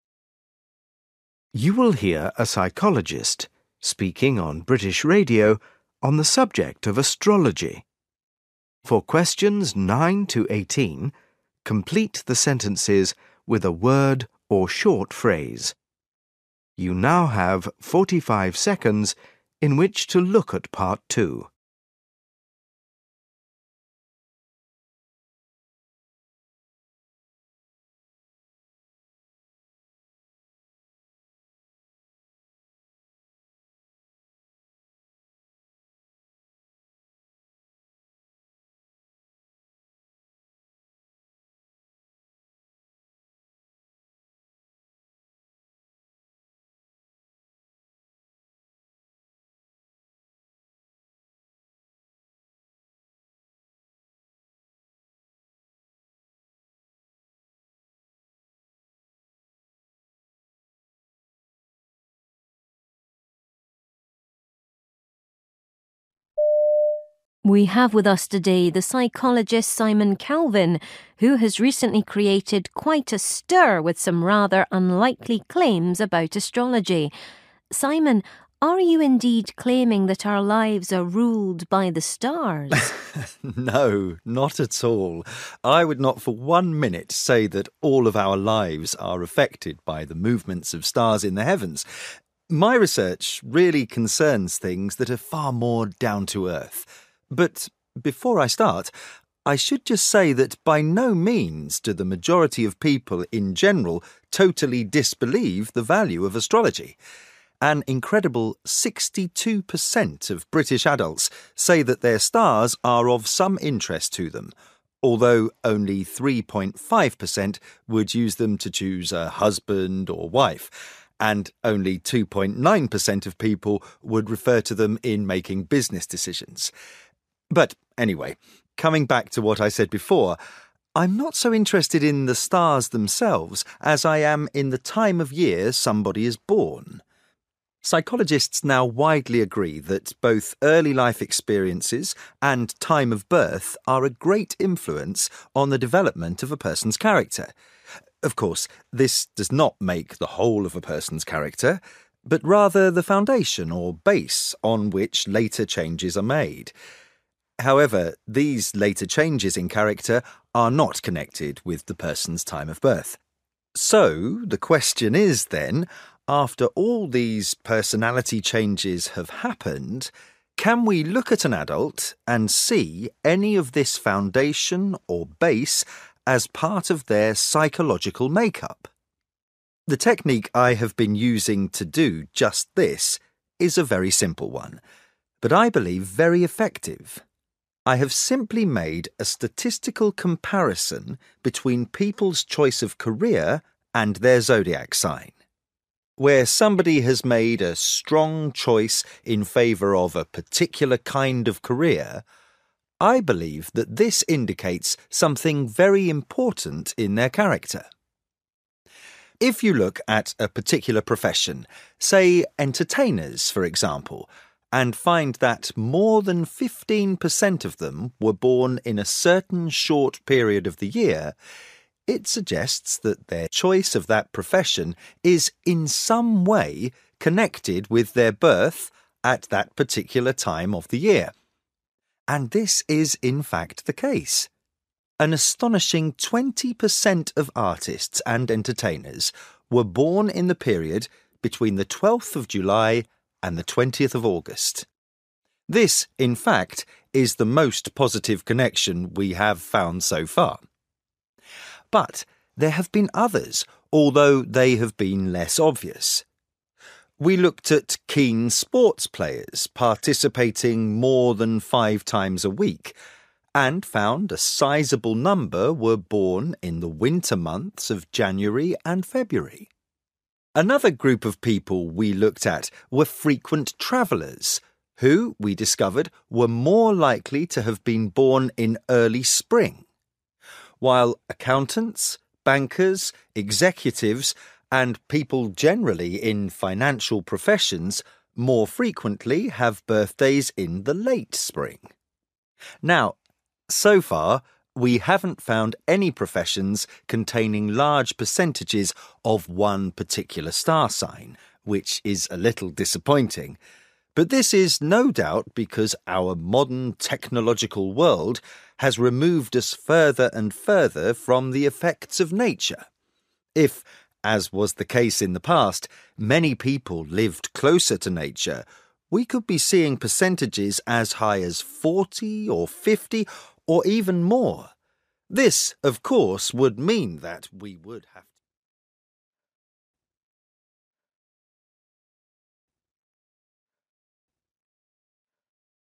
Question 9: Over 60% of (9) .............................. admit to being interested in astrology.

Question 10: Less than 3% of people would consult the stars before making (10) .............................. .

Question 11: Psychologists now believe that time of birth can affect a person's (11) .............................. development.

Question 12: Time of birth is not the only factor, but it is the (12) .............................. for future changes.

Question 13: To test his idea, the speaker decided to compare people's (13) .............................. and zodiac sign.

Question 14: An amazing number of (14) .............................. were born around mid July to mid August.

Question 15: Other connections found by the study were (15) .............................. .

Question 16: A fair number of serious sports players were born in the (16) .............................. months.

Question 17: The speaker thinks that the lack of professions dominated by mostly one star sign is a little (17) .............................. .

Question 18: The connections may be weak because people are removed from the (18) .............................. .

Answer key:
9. British adults
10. business decisions
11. character
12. foundation/base
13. choice of career
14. artists and entertainers
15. less obvious
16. winter
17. disappointing
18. effects of nature

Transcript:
Introducer: We have with us today the psychologist Simon Calvin who has recently created quite a stir with some rather unlikely claims about Astrology. Simon, are you indeed claiming that our lives are ruled by the stars?
Simon: No, not at all. I would not for one minute say that all of our lives are affected by the movements of stars in the heavens. My research really concerns things that are far more down to earth. But, before I start, I should just say that by no means do the majority of people in general totally disbelieve the value of astrology. An incredible 62% of British adults say that their stars are of some interest to them although only 3.5% would use them to choose a husband or wife, and only 2.9% of people would refer to them in making business decisions. But anyway, coming back to what I said before, I'm not so interested in the stars themselves, as I am in the time of year somebody is born. Psychologists now widely agree that both early life experiences and time of birth are a great influence on the development of a person's character. Of course, this does not make the whole of a per son's character, but rather the foundation or base on which later changes are made.
However, these later changes in character are not connected with the person's time of birth. So the question is, then, after all these personality changes have happened, can we look at an adult and see any of this foundation or base as part of their psycho logical make-up? The technique I have been using to do just this is a very simple one, but I believe, very effective. I have simply made a statistical comparison between people's choice of career and their zodiac sign. Where somebody has made a strong choice in favour of a particular kind of career, I believe that this indicates something very important in their character. If you look at a particular profession, say entertainers for example, and find that more than 15% of them were born in a certain short period of the year, it suggests that their choice of that profession is in some way connected with their birth at that particular time of the year. And this is, in fact, the case. An astonishing 20% of artists and entertainers were born in the period between the 12th of July and the 20th of August.
This, in fact, is the most positive connection we have found so far. But there have been others although they have been less obvious. We looked at keen sports players participating more than five times a week and found a sizable number were born in the winter months of January and February. Another group of people we looked at were frequent travellers, who we discovered were more likely to have been born in early spring while accountants, bankers, executives and people generally in financial professions more frequently have birthdays in the late spring.
Now, so far, we haven't found any professions containing large percentages of one particular star sign, which is a little disappointing, but this is, no doubt, because our modern technological world has re moved us further and further from the effects of nature. If, as was the case in the past, many people lived closer to nature, we could be seeing percentages as high as 40 or 50 or even more. This of course would mean that we would have ...